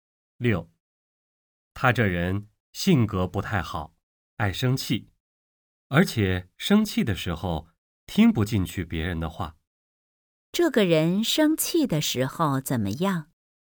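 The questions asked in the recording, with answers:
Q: 这个人生气的时候怎么样?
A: 听不进去别人的话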